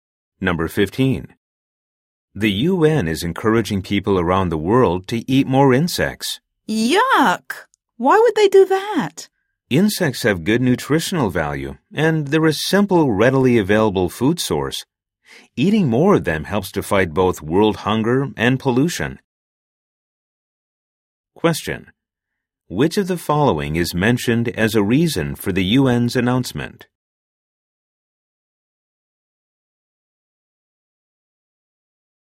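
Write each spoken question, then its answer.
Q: Which of the following is mentioned as a reason for the UN's announcement?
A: Insects are nutritious and readily available; eating them helps fight hunger and pollution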